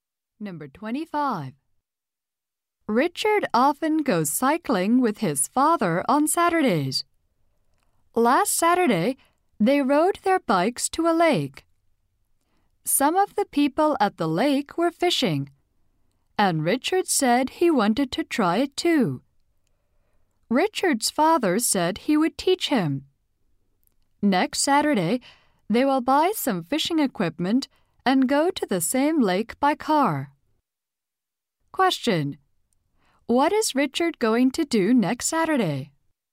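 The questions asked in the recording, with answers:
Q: What is Richard going to do next Saturday?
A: Buy fishing equipment and go fishing at the lake.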